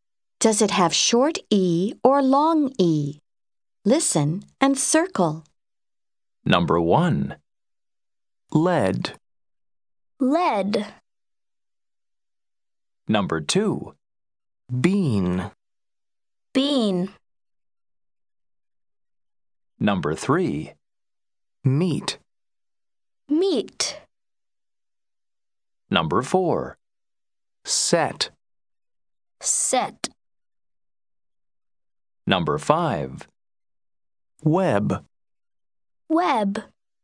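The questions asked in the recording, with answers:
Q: Number two. Bean.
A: long E

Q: Number three. Meat.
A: long E

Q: Number four. Set.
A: short E

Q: Number five. Web.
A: short E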